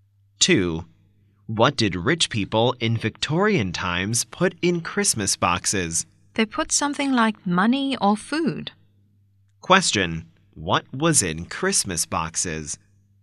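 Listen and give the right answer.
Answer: Money or food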